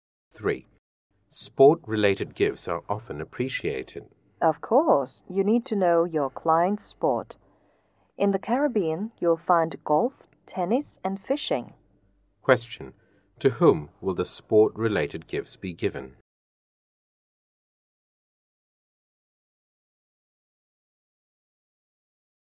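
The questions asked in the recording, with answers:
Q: To whom will the sport-related gifts be given?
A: To clients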